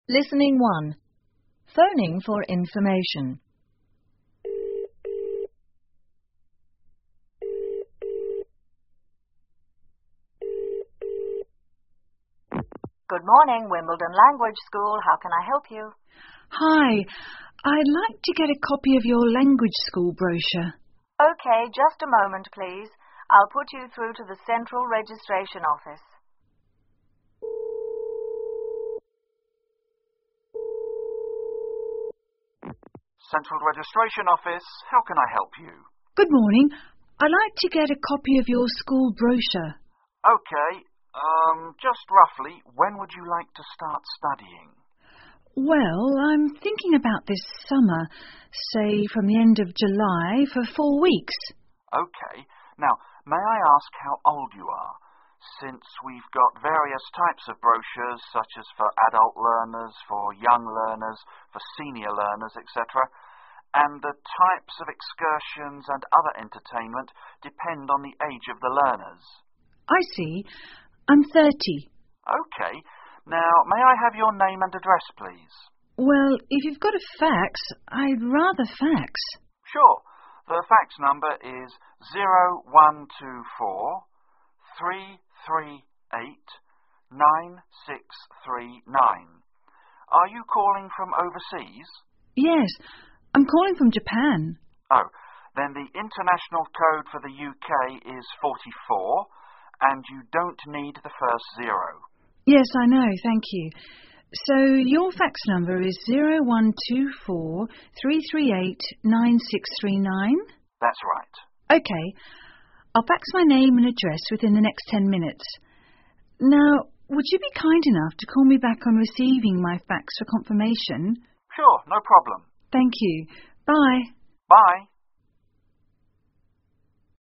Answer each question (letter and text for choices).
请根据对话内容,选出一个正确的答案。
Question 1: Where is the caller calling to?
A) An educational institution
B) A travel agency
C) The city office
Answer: A) An educational institution

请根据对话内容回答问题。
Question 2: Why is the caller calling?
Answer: To get a language school brochure

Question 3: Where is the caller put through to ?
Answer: The Central Registration Office

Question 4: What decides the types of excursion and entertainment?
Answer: It depends on the age of the learners

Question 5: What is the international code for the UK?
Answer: 44

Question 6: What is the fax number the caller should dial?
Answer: 44-124-3 3 8-963 9

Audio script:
Operator 1:good morning,Wimbledon Language School,how can I help you?
Caller:Hi,I'd like to get a copy of your language school brochure.
O1:OK,just a moment,please.I'll put you through to the Central Registration Office.
O2:OK,urm just roughly,when would you like to start studying?
C:Well,I'm thinking about this summer,say,from the end of July for four weeks. O2:OK.Now,may I ask how old you are?Since we've got various types of brochures,such as for adult learner,for young learners,for senior learners,etc.And the types of excursions and other entertainment depend on the age of the learners.
C:I see.I'm 30.
O2:OK,now,may I have your name and address,please?
C:Well,if you've got a fax,I'd rather fax.
O2:Sure,the fax number is 0124-338-9639.Are you calling from overseas?
C:Yes,I'm calling from Japan.
O2:Oh,then the international code for the UK is 44 and you don't need the first 0
C:Yes,I know,thank you.So your fax number is 0124-338-9639?
O2:That's right.
C:OK,I'll fax my name and address within the next 10 minutes.Now,would you be kind enough to call me back on receiving my fax for confirmation?
O2:Sure,no problem.
C:Thank you,bye.
O2:Bye.